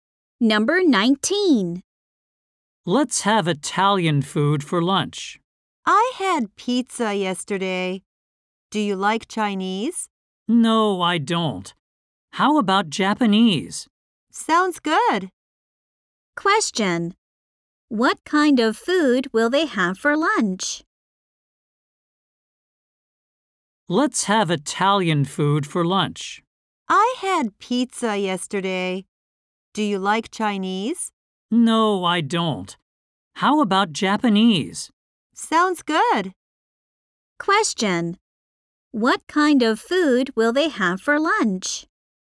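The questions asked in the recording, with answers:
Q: What kind of food will they have for lunch?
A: Japanese food.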